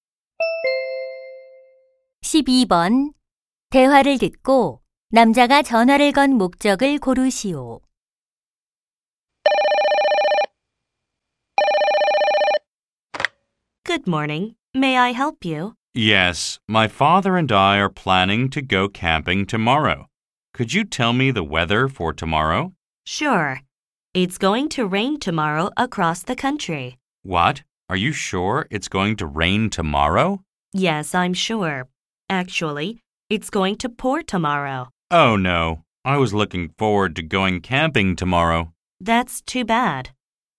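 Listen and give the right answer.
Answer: 내일 날씨를 물어보려고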